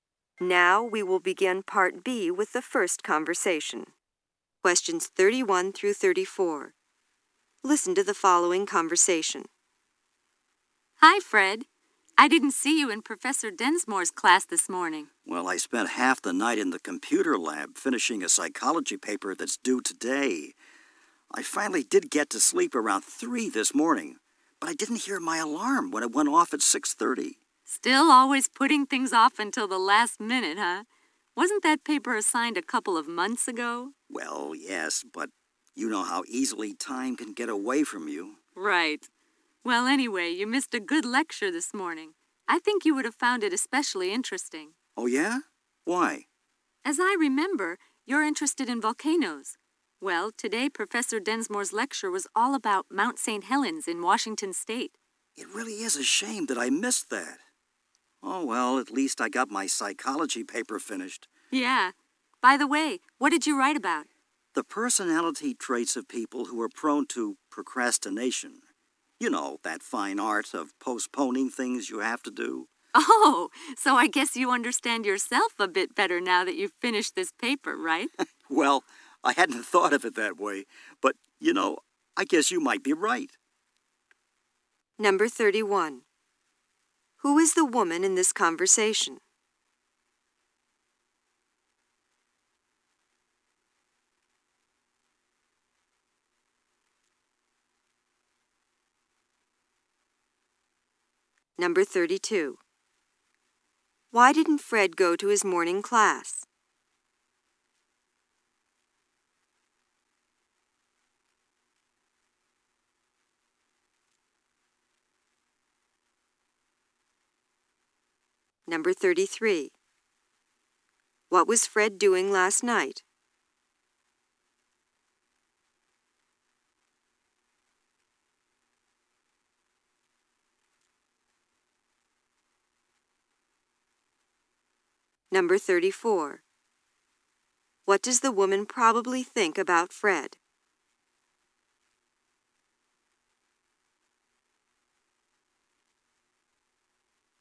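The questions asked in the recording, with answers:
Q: Why didn't Fred go to his morning class?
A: He overslept and didn't hear his alarm.

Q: What was Fred doing last night?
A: Finishing a psychology paper in the computer lab.

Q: What does the woman probably think about Fred?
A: He is a procrastinator.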